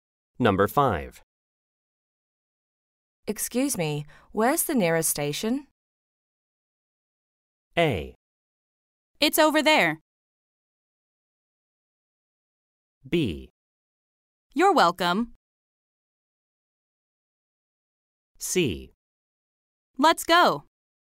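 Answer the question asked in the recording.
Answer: A: It's over there.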